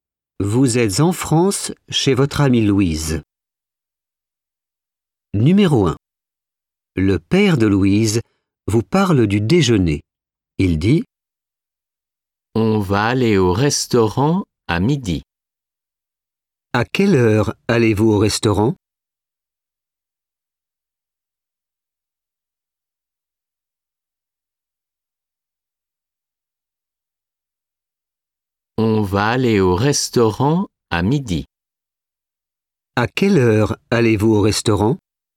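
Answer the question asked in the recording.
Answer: à midi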